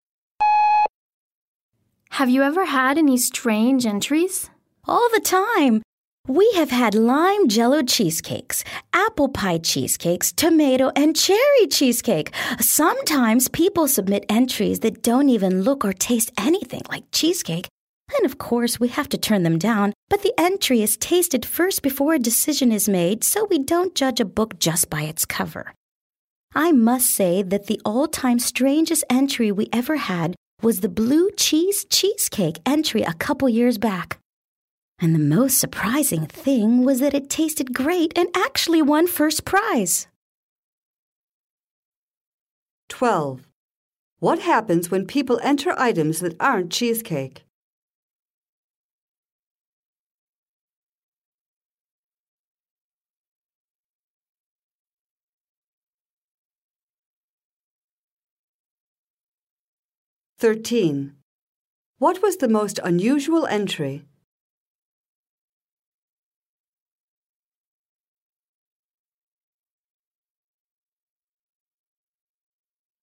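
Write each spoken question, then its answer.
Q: What happens when people enter items that aren't cheesecake?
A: They are tasted first and then turned down

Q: What was the most unusual entry?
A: A blue cheese cheesecake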